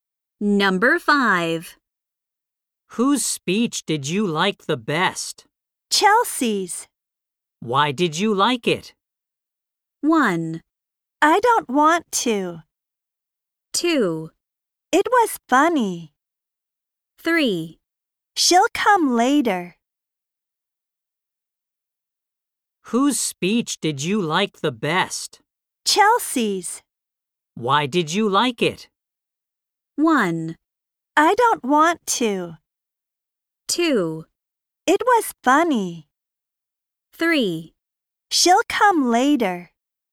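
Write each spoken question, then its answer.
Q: Why did you like it?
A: 2: It was funny.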